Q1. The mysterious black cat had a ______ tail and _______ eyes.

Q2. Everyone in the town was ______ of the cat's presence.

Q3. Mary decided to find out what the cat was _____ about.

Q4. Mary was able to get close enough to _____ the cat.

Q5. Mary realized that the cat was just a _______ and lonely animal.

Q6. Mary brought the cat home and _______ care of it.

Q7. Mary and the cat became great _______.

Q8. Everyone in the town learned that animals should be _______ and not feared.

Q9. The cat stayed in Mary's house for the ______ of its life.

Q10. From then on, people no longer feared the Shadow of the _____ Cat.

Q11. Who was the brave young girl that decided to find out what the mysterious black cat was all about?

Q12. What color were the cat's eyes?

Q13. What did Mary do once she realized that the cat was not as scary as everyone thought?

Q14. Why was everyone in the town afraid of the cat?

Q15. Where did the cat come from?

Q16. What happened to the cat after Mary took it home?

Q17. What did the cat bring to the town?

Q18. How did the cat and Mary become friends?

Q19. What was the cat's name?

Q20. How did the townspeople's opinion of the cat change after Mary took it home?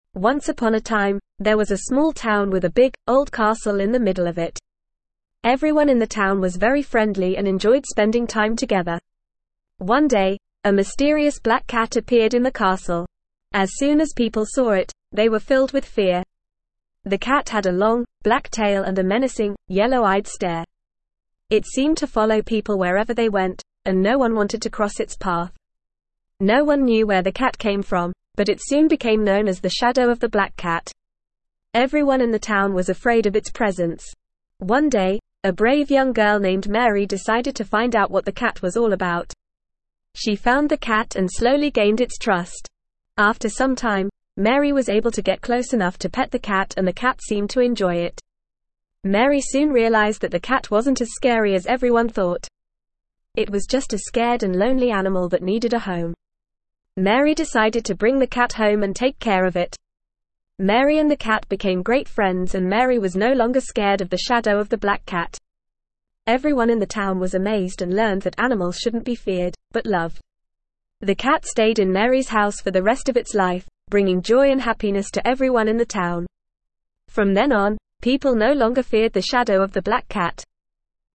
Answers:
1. long tail and yellow
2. afraid
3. all
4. pet
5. scared
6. took
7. friends
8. loved
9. rest
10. Black
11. Mary
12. Yellow
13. She decided to bring the cat home and take care of it.
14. It had a long, black tail and a menacing, yellow-eyed stare.
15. No one knew.
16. It stayed in Mary's house for the rest of its life.
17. Joy and happiness.
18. Mary slowly gained its trust and was able to get close enough to pet the cat and the cat seemed to enjoy it.
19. The Shadow of the Black Cat.
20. They no longer feared the Shadow of the Black Cat.

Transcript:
Once upon a time, there was a small town with a big, old castle in the middle of it. Everyone in the town was very friendly and enjoyed spending time together.
One day, a mysterious black cat appeared in the castle. As soon as people saw it, they were filled with fear. The cat had a long, black tail and a menacing, yellow-eyed stare. It seemed to follow people wherever they went, and no one wanted to cross its path.
No one knew where the cat came from, but it soon became known as the Shadow of the Black Cat. Everyone in the town was afraid of its presence.
One day, a brave young girl named Mary decided to find out what the cat was all about. She found the cat and slowly gained its trust. After some time, Mary was able to get close enough to pet the cat and the cat seemed to enjoy it.
Mary soon realized that the cat wasn't as scary as everyone thought. It was just a scared and lonely animal that needed a home. Mary decided to bring the cat home and take care of it.
Mary and the cat became great friends and Mary was no longer scared of the Shadow of the Black Cat. Everyone in the town was amazed and learned that animals shouldn't be feared, but loved.
The cat stayed in Mary's house for the rest of its life, bringing joy and happiness to everyone in the town. From then on, people no longer feared the Shadow of the Black Cat.

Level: Level 2